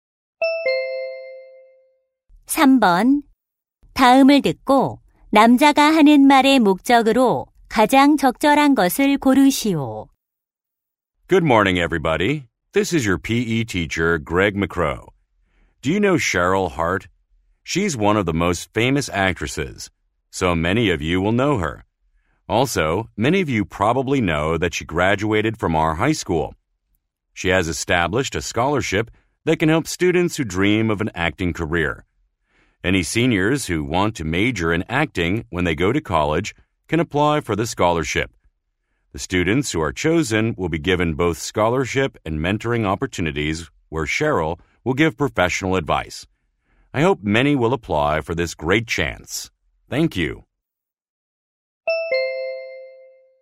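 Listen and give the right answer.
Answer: 배우 지망 3학년 학생들에게 장학금 신청을 권장하려고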